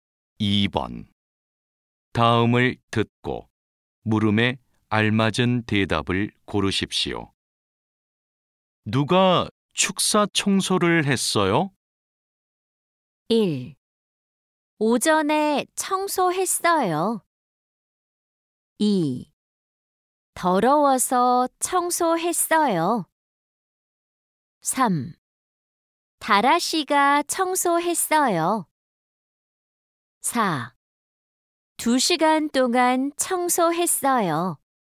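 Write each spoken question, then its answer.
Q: 누가 축사 청소를 했어요?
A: 3: 다라 씨가 청소했어요.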